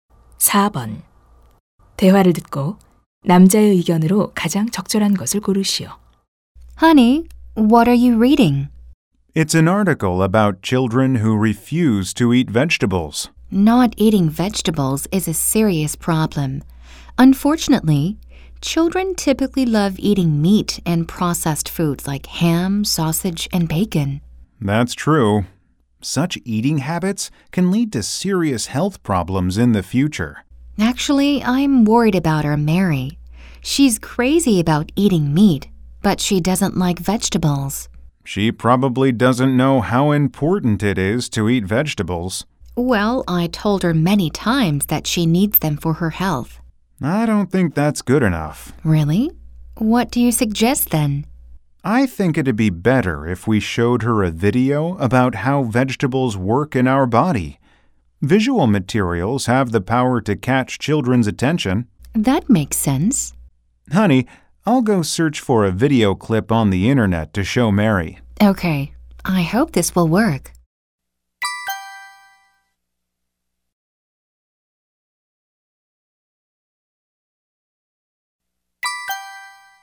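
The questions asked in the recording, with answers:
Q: 대화를 듣고 남자의 의견으로 가장 적절한 것을 고르시오.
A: 시각 자료(영상)는 아이들의 관심을 끄는 힘이 있다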